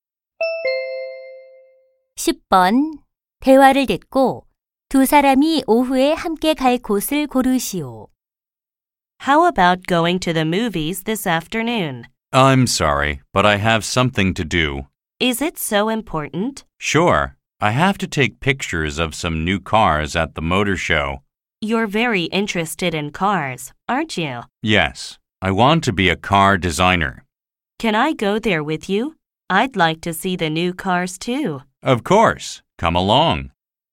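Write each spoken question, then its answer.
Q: 대화를 듣고 두 사람이 오후에 함께 갈 곳을 고르시오.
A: 모터쇼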